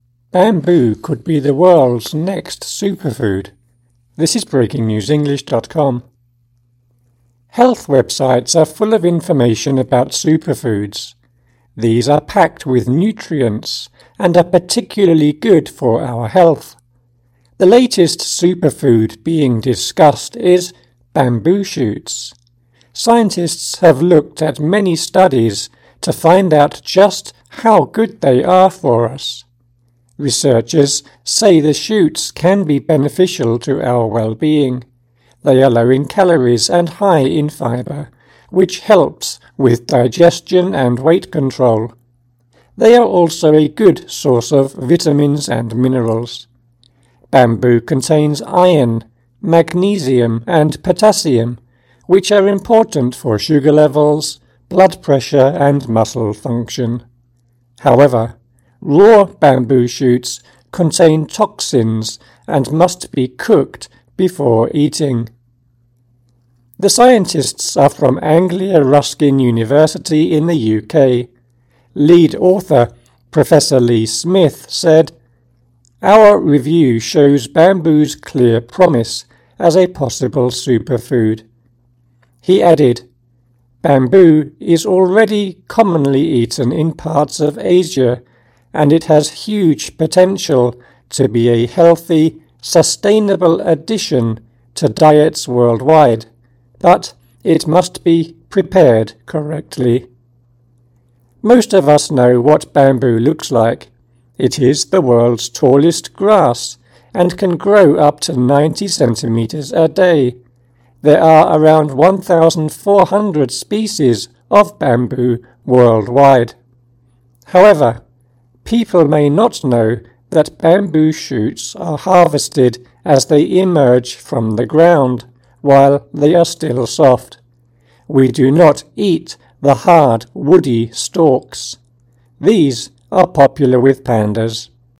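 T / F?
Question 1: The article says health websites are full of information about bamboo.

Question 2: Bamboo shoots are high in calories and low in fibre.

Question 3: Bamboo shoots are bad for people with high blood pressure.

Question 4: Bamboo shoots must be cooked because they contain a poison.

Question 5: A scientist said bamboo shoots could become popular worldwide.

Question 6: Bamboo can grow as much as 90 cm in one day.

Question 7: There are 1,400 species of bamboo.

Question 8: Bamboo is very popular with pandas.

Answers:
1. F
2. F
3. F
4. T
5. T
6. T
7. T
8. T

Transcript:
Bamboo could be the world's next superfood
Health websites are full of information about superfoods. These are packed with nutrients and are particularly good for our health. The latest superfood being discussed is bamboo shoots. Scientists have looked at many studies to find out just how good they are for us. 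Researchers say the shoots can be beneficial to our well-being. They are low in calories and high in fibre, which helps with digestion and weight control. They are also a good source of vitamins and minerals. Bamboo contains iron, magnesium, and potassium, which are important for sugar levels, blood pressure, and muscle function. However, raw bamboo shoots contain toxins and must be cooked before eating.
The scientists are from Anglia Ruskin University in the UK. Lead author Professor Lee Smith said: "Our review shows bamboo's clear promise as a possible superfood." He added: "Bamboo is already commonly eaten in parts of Asia, and it has huge potential to be a healthy, sustainable addition to diets worldwide, but it must be prepared correctly." Most of us know what bamboo looks like. It is the world's tallest grass and can grow up to 90 cm a day. There are around 1,400 species of bamboo worldwide. 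However, people may not know that bamboo shoots are harvested as they emerge from the ground, while they are still soft. We do not eat the hard, woody stalks. These are popular with pandas.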